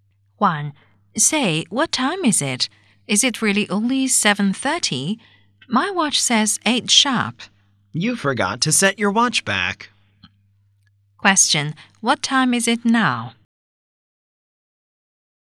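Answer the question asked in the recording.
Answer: 7:30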